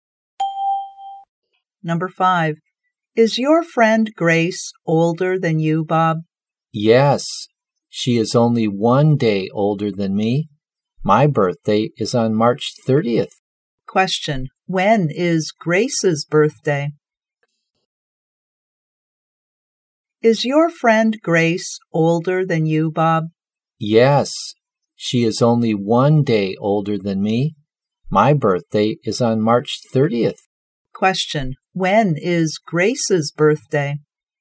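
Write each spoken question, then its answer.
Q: When is Grace's birthday?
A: March 29th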